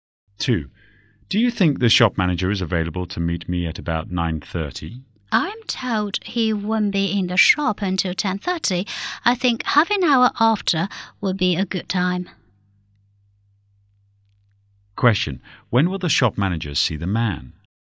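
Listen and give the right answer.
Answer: At 11:00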